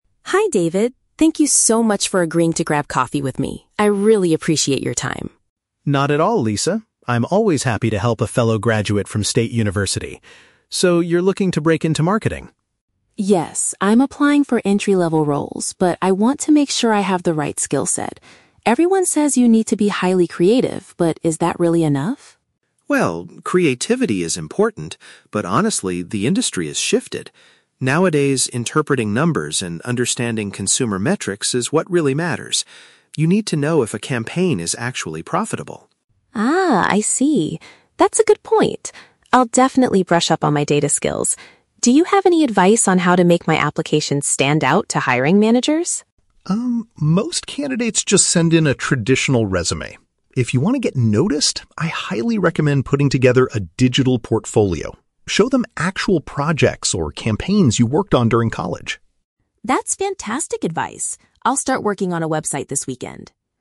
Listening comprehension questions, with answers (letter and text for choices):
Listen to the conversation between a recent graduate and an industry professional. Choose the correct answer (A, B, or C) for each question.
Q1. What is the main reason Lisa wanted to meet with David?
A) To ask him for a job at his marketing agency.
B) To learn about the practical requirements of a specific career.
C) To invite him to a university alumni event.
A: B) To learn about the practical requirements of a specific career.

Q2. According to David, what is the most crucial skill for modern marketers?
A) The ability to analyze statistics and campaign results.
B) Coming up with highly creative and original ideas.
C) Knowing how to manage a large advertising budget.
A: A) The ability to analyze statistics and campaign results.

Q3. What does David suggest Lisa do to improve her chances of getting hired?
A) Rewrite her traditional resume to include more keywords.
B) Apply primarily for entry-level roles at large companies.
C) Create an online collection of her past academic projects.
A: C) Create an online collection of her past academic projects.

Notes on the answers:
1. Lisa says she wants to "break into marketing" and "make sure I have the right skill set". Option (B) correctly paraphrases this as learning about the practical requirements of a career. Option (A) is not mentioned (she asks for advice, not a job directly from him). Option (C) is The Trap: David mentions they are both "graduates from State University" (alumni), but Lisa is not inviting him to an event.
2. David emphasizes that "interpreting numbers and understanding consumer metrics is what really matters". Option (A) perfectly paraphrases this. Option (B) is The Trap: Lisa mentions being "highly creative", but David responds that while important, the industry has shifted away from just creativity. Option (C) is plausible in marketing but never mentioned.
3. David recommends "putting together a digital portfolio" to show "projects... you worked on during college". Lisa agrees and says she will build a "website". Option (C) is a precise paraphrase of these actions. Option (A) is The Trap: David mentions a "traditional resume", but he states that this is what most candidates do, implying it is NOT the way to stand out. Option (B) uses the phrase "entry-level roles" from the audio, but David doesn't give this specific advice.

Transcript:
Lisa: Hi David, thank you so much for agreeing to grab coffee with me. I really appreciate your time.
David: Not at all, Lisa. I'm always happy to help a fellow graduate from State University. So, you're looking to break into marketing?
Lisa: Yes. I'm applying for entry-level roles, but I want to make sure I have the right skill set. Everyone says you need to be highly creative, but is that really enough?
David: Well, creativity is important, but honestly, the industry has shifted. Nowadays, interpreting numbers and understanding consumer metrics is what really matters. You need to know if a campaign is actually profitable.
Lisa: Ah, I see. That's a good point. I'll definitely brush up on my data skills. Do you have any advice on how to make my application stand out to hiring managers?
David: Um, most candidates just send in a traditional resume. If you want to get noticed, I highly recommend putting together a digital portfolio. Show them actual projects or campaigns you worked on during college.